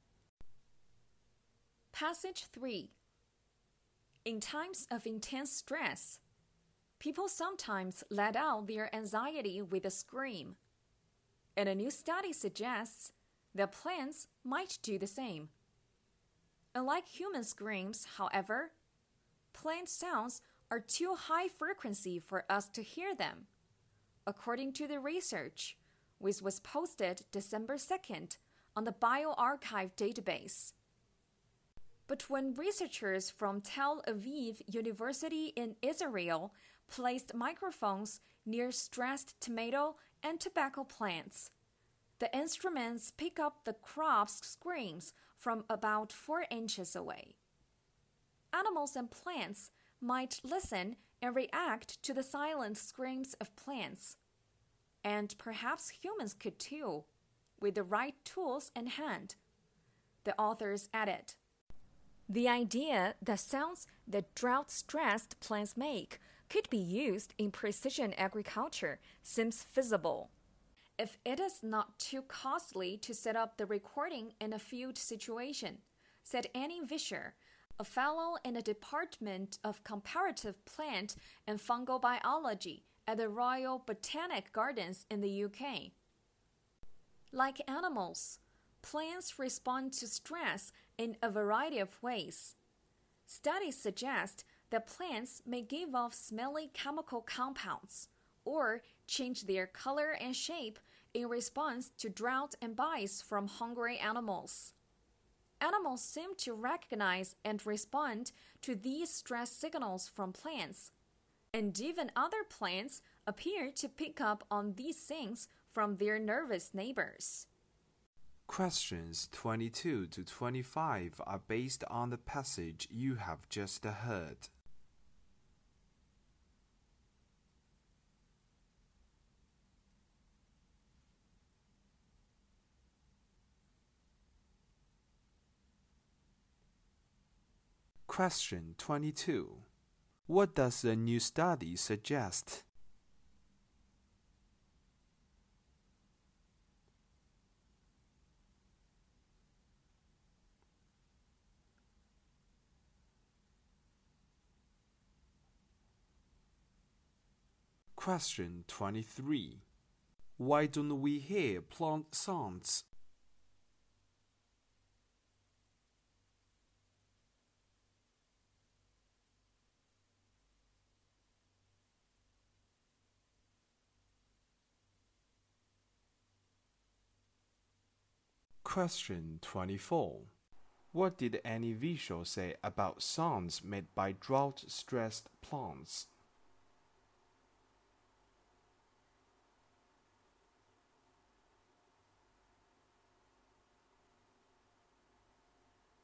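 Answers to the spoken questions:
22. Plants might scream when stressed.
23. Their frequency is too high.
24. They could feasibly be used in precision agriculture if recording is not too costly.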